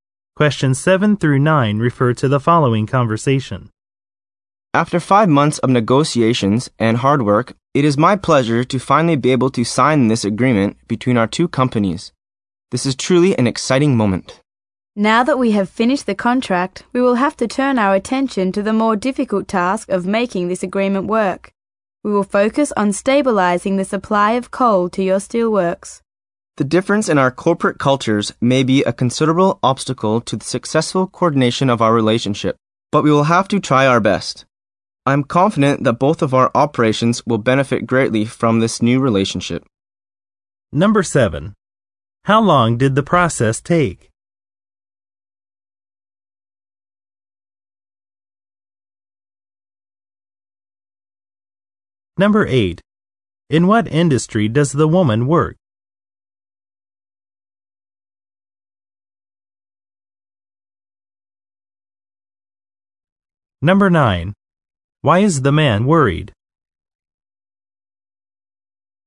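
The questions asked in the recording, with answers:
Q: How long did the process take?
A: 5 months

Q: Why is the man worried?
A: Differences in corporate cultures may be an obstacle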